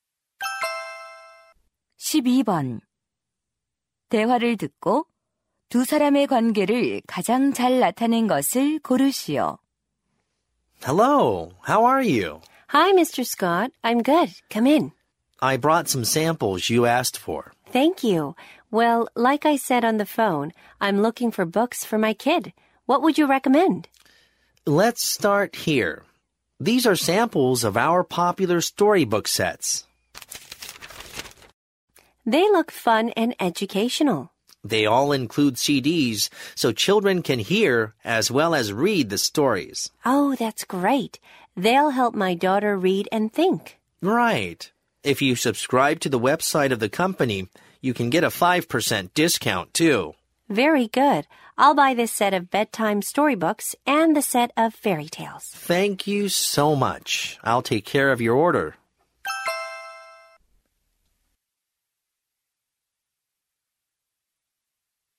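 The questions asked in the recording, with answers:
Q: 대화를 듣고 두 사람의 관계를 가장 잘 나타낸 것을 고르시오.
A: 도서 판매원 - 학부모(고객)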